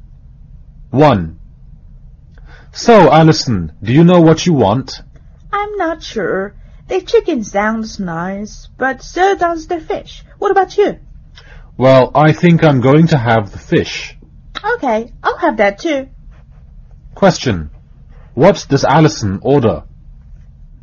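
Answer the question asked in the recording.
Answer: The fish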